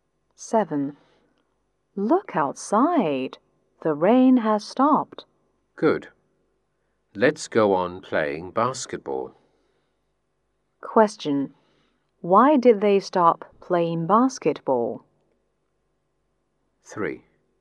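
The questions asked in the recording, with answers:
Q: Why did they stop playing basketball?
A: Because it was raining.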